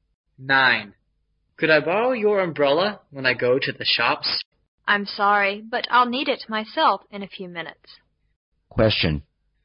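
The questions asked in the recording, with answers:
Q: What does the man ask the woman to do?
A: Lend him her umbrella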